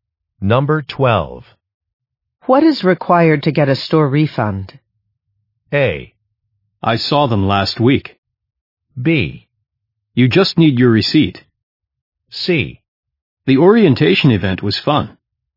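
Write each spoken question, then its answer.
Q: What is required to get a store refund?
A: B: You just need your receipt.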